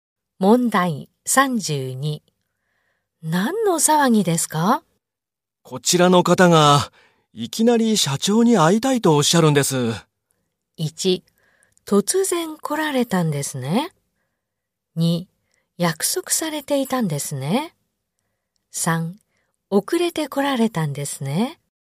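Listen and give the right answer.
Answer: 1: 突然来られたんですね。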